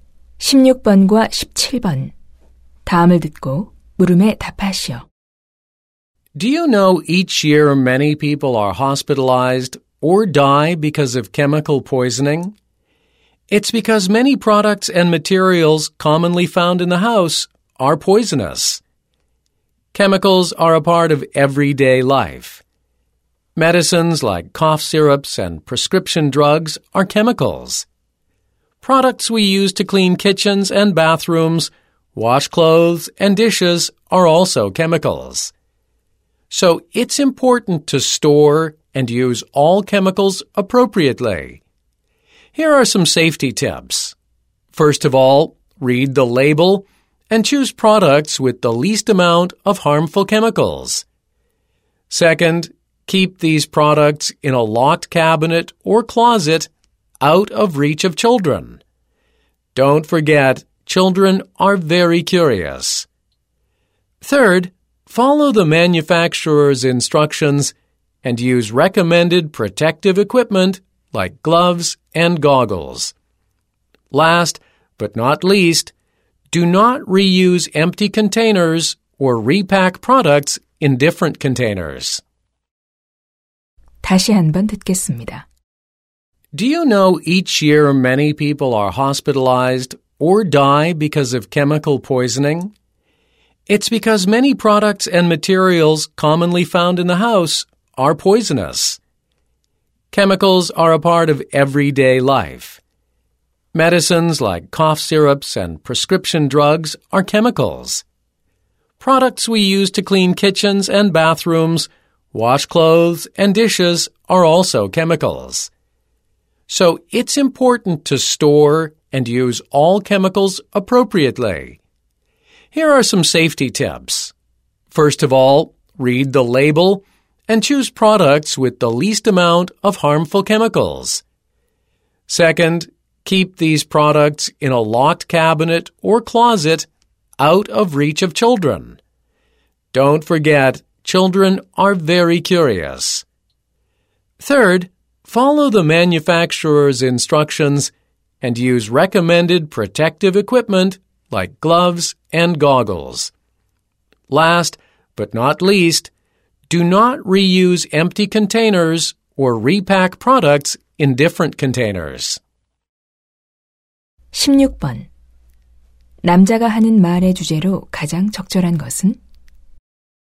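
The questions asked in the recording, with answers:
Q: 남자가 하는 말의 주제로 가장 적절한 것은?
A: 가정용 화학 제품의 안전한 보관과 사용법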